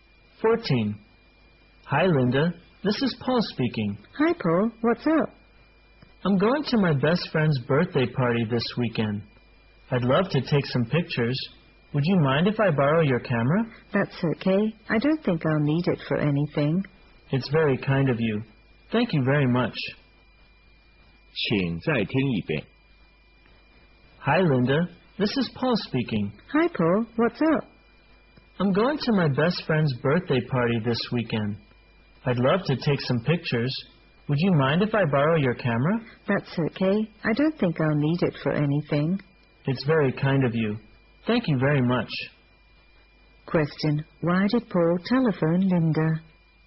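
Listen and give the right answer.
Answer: To borrow her camera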